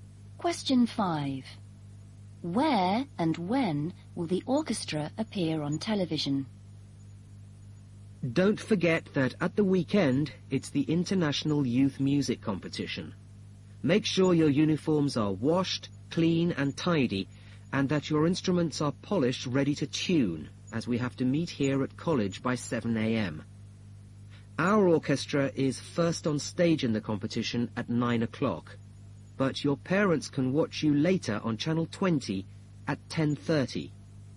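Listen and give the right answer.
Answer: On Channel 20 at 10:30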